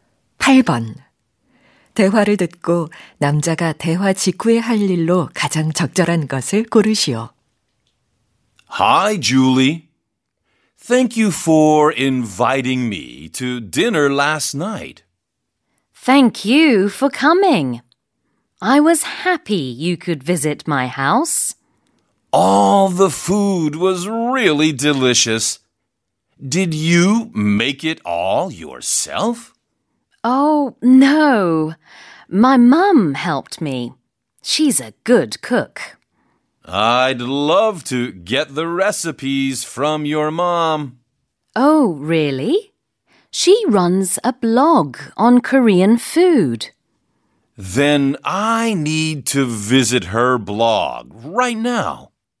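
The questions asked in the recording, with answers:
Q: 대화를 듣고 남자가 대화 직후에 할 일로 가장 적절한 것을 고르시오.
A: 여자 엄마의 블로그 방문하기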